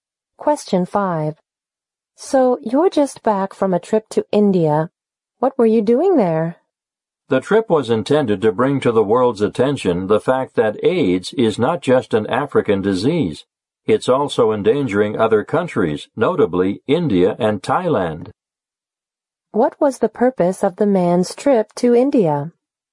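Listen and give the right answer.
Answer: To call the world's attention to the fact that AIDS is not only an African disease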